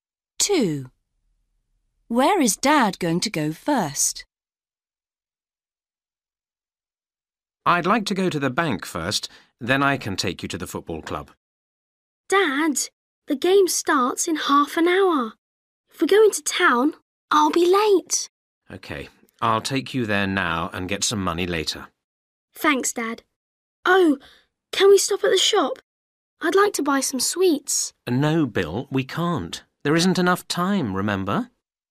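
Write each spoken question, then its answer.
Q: Where is Dad going to go first?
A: the football club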